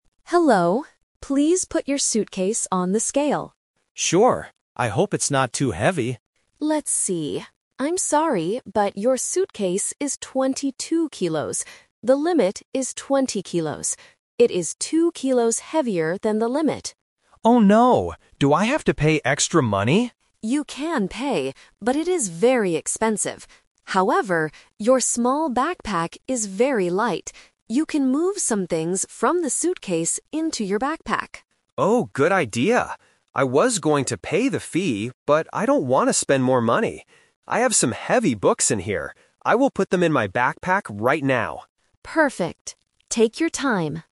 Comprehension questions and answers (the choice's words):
Listen to the conversation and choose the correct answer (A, B, or C).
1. What is the problem with the passenger's suitcase?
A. It is too small for the books.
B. It is two kilos too heavy.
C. It is broken.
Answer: It is two kilos too heavy.

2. What does the agent say about the backpack?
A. It is very light.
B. It is too heavy for the airplane.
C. It is very expensive.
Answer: It is very light.

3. What does the passenger decide to do?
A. Pay extra money for the suitcase.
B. Move heavy books to the backpack.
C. Leave the books at the airport.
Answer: Move heavy books to the backpack.

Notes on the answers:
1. The agent says the suitcase is 22 kilos, which is "two kilos heavier than the limit." Option A is a trap using the word "small" (which describes the backpack, not the suitcase). Option C is a plausible problem with luggage, but it is not mentioned in the audio.
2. The agent tells the passenger, "your small backpack is very light." Option B is a trap because the suitcase is the heavy item, not the backpack. Option C is a trap using the word "expensive," which refers to paying the extra fee, not the backpack.
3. This uses the "Twist" technique. The passenger initially thinks about paying the extra money (and was going to pay the fee), but changes his mind when he realizes it is expensive. He decides to move his heavy books into the backpack instead. Option A is the main trap (his original thought). Option C is incorrect.

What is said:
Agent: Hello. Please put your suitcase on the scale.
Passenger: Sure. I hope it's not too heavy.
Agent: Let's see... I'm sorry, but your suitcase is twenty-two kilos. The limit is twenty kilos. It is two kilos heavier than the limit.
Passenger: Oh no! Do I have to pay extra money?
Agent: You can pay, but it is very expensive. However, your small backpack is very light. You can move some things from the suitcase into your backpack.
Passenger: Oh, good idea. I was going to pay the fee, but I don't want to spend more money. I have some heavy books in here.